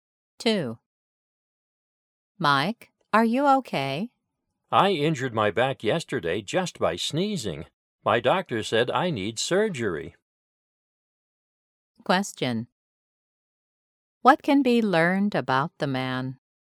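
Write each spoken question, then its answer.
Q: What can be learned about the man?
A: He hurt his back and needs surgery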